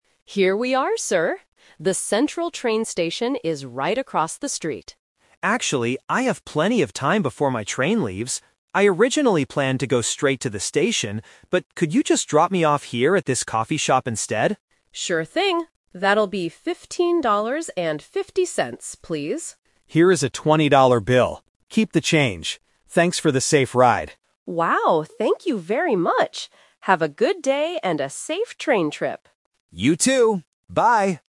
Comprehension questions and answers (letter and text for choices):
Listen to the conversation and choose the correct answer (A, B, or C).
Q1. Where does the passenger get off the taxi?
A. At the train station.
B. At a coffee shop.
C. At the airport.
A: B. At a coffee shop.

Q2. Why does the passenger change his plan?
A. Because the traffic is too heavy.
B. Because he wants to meet a friend.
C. Because he has extra time before his train.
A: C. Because he has extra time before his train.

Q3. How does the passenger pay the driver?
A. He gives the driver a twenty-dollar bill.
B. He pays exactly fifteen dollars and fifty cents.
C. He uses his credit card.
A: A. He gives the driver a twenty-dollar bill.

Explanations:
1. The passenger asks the driver, "could you just drop me off here at this coffee shop instead?" Trap: Option (A) is the "Twist" trap. The train station was his original destination, and it is "across the street," but he doesn't get off there. Option (C) is a common place to take a taxi to, but it is not mentioned.
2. The passenger explains, "I have plenty of time before my train leaves." Trap: Options (A) and (B) are plausible reasons for changing a drop-off location, but they are not mentioned in the audio.
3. The passenger says, "Here is a twenty-dollar bill. Keep the change." Trap: Option (B) is a trap because $15.50 is the cost of the ride, but not what the passenger actually hands to the driver (he gives more as a tip). Option (C) is a common payment method but not used here.

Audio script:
Driver: Here we are, sir. The central train station is right across the street.
Passenger: Actually, I have plenty of time before my train leaves. I originally planned to go straight to the station, but could you just drop me off here at this coffee shop instead?
Driver: Sure thing. That'll be fifteen dollars and fifty cents, please.
Passenger: Here is a twenty-dollar bill. Keep the change. Thanks for the safe ride.
Driver: Wow, thank you very much! Have a good day and a safe train trip!